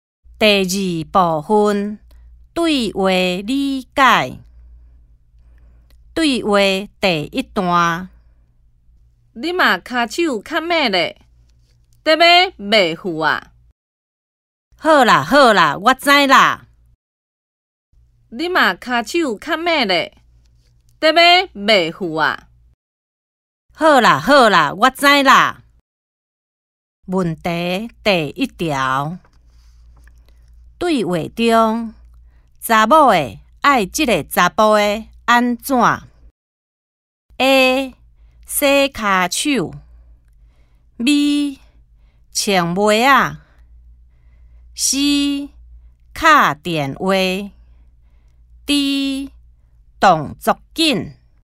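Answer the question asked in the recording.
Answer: D: 动作紧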